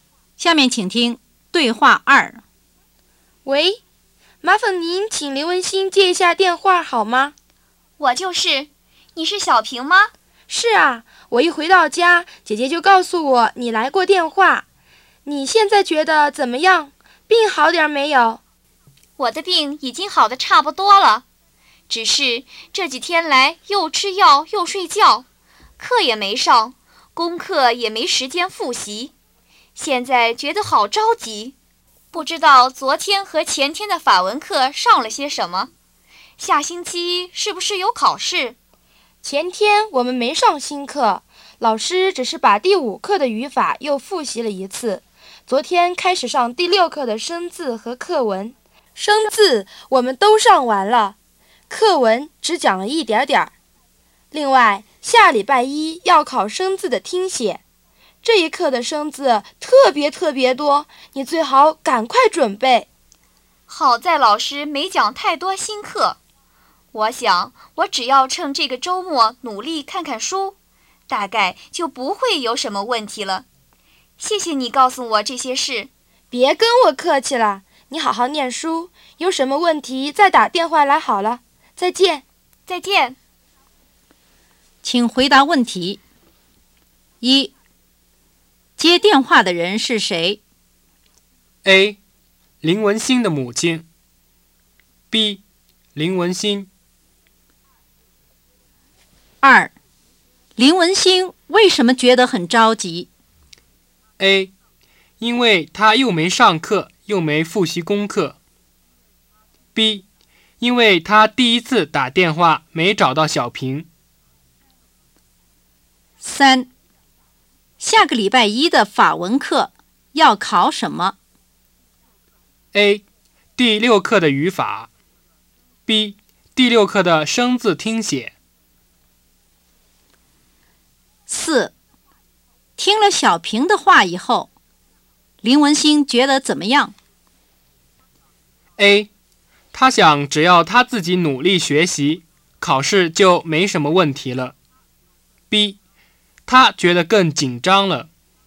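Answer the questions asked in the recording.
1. B: 林文星。
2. A: 因为他又没上课又没复习功课。
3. B: 第六课的生字听写。
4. A: 他想只要他自己努力学习,考试就没什么问题了。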